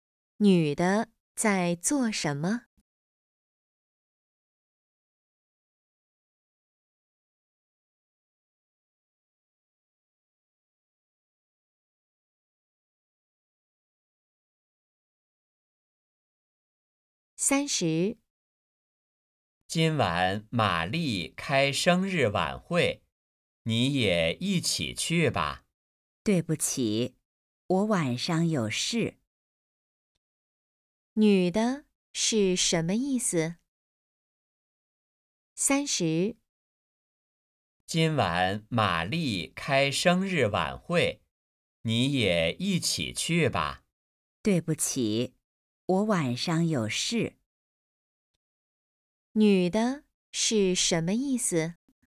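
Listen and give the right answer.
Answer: 晚上有事,不能去晚会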